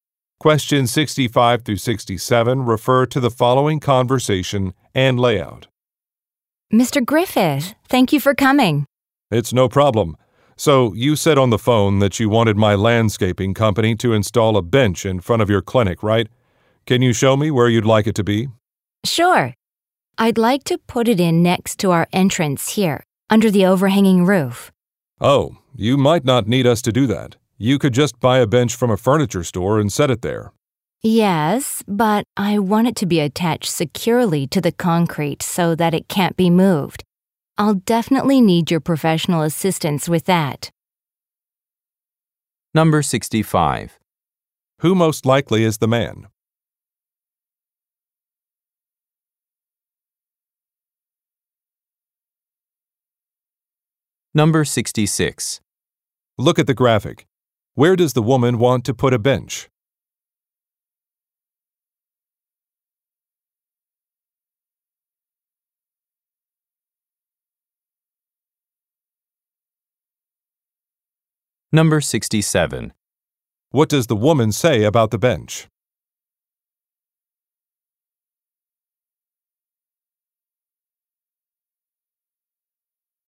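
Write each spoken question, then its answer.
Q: Who most likely is the man?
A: A landscaper

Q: What does the woman say about the bench?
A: She wants it attached securely to the concrete so it can't be moved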